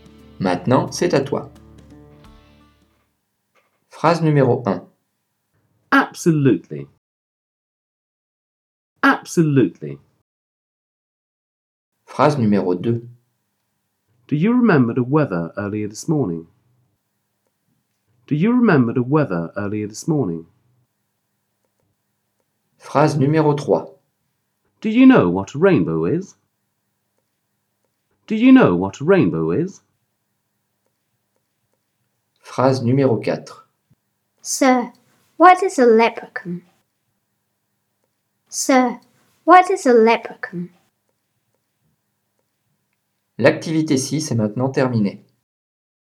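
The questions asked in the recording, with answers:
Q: Do you remember the weather earlier this morning?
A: question

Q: Do you know what a rainbow is?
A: question

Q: Sir, what is a leprechaun?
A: question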